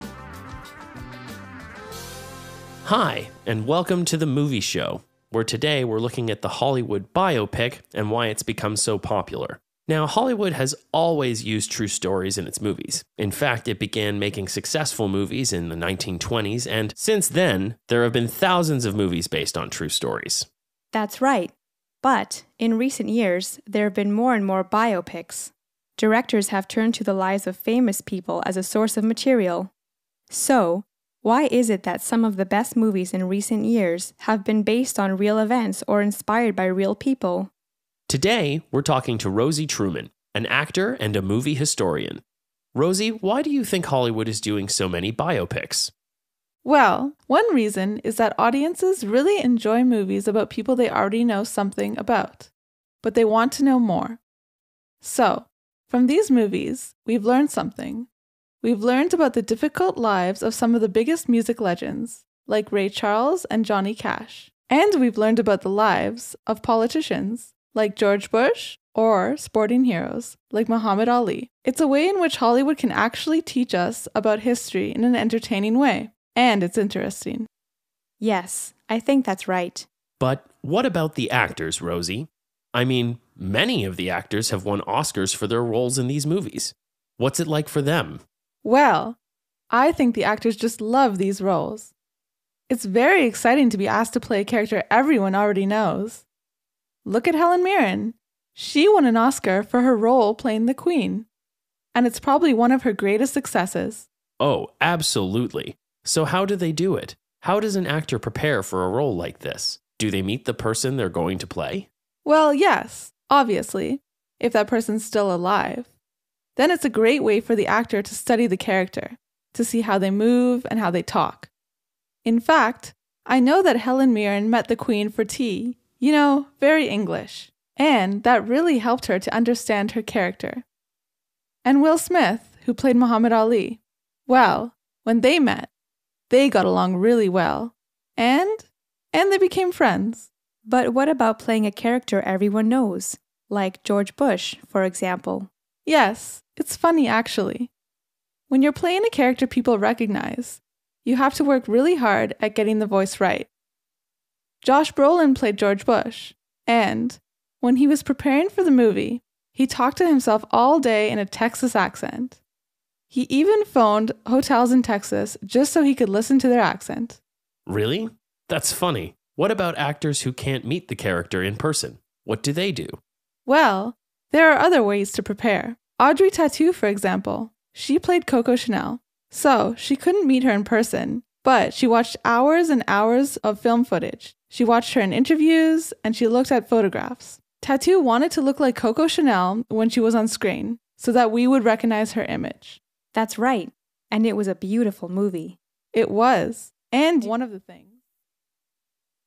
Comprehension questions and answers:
C. Listen to the whole problem and complete the information.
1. Hollywood has always used ............ ............ in its films.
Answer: true stories

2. Hollywood began making movies in the ............s.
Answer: 1920s

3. Some of the best movies in recent years have been based on ............ ............ .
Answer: real events

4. From these movies we're learned about the ............ lives of some of the biggest music legends.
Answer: difficult

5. Many of these actors have won ............ for their roles.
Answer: Oscars

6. Helen Mirren met the Queen for ............ .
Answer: tea

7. Josh Brolin phoned hotels in Texas to listen to their ............ .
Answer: accent

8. Tautou wanted to look like Coco Chanel so that we would recognize her ............ .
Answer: image

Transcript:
H1: Hi, and welcome to The Movie Show, where today we're looking at the Hollywood biopic and why it's become so popular. Now, Hollywood has always used true stories in its movies. In fact, it began making successful movies in the 1920s, and, since then, there have been thousands of movies based on true stories.
H2: That's right. But, in recent years, there've been more and more biopics. Directors have turned to the lives of famous people as a source of material. So, why is it that some of the best movies in recent years have been based on real events or inspired by real people?
H1: Today, we're talking to Rosie Truman, an actor and a movie historian. Rosie, why do you think Hollywood is doing so many biopics?
R: Well, one reason is that audiences really enjoy movies about people they already know something about, but they want to know more. So, from these movies, we've learned something. We've learned about the difficult lives of some of the biggest music legends, like Ray Charles and Johnny Cash.
We've learned about the difficult lives of some 165 of the biggest music legends, like Ray Charles and Johnny Cash. And we've learned about the lives of politicians, like George Bush, or sporting heroes, like Muhammad Ali. It's a way in which Hollywood can actually teach us about history in an entertaining way. And it's interesting.
H2: Yes, I think that's right.
H2: But, what about the actors, Rosie? I mean, many of the actors have won Oscars for their roles in these movies. What's it like for them?
R: Well, I think actors just love these roles. It's very exciting to be asked to play a character everyone already knows. Look at Helen Mirren. She won an Oscar for her role playing the Queen, and it's probably one of her greatest successes.
H1: Oh, absolutely! So, how do they do it? How does an actor prepare for a role like this? Do they meet the person they're going to play?
R: Well, yes, obviously, if that person is still alive, then that's a great way for the actor to study the character, to see how they move and how they talk. In fact, I know that Helen Mirren met the Queen for tea, you know, very English. And that really helped her to understand her character. And Will Smith, who played Muhammad Ali ... Well, when they met, they got along really well, and ... and they became friends.
H2: But what about playing a character everyone knows, like George Bush, for example?
R: Yes, it's funny actually, when you're playing a character people recognize, you have to work really hard at getting the voice right. Josh Brolin played George Bush. And, when he was preparing for the movie, he talked to himself all day in a Texas accent. He even phoned hotels in Texas, just so he could listen the accent.
H1: Really? That's funny. What about actors who can't meet the character in person?
R: Well, there are other ways to prepare. Audrey Tautou, for example. She played Coco Chanel. So, she couldn't meet her in person, but she watched hours and hours of film footage. She watched her in interviews, and she looked at photographs. Tautou wanted to look like Coco Chanel when she was on screen so that we would recognize her image.
H2: That's right. And it was a beautiful movie.